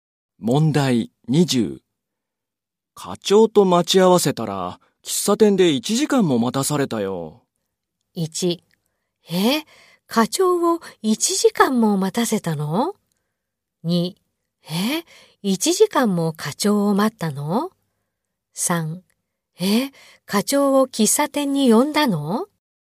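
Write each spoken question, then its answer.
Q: 課長と待ち合わせたら、喫茶店で1時間も待たされたよ。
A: 2: え、1時間も課長を待ったの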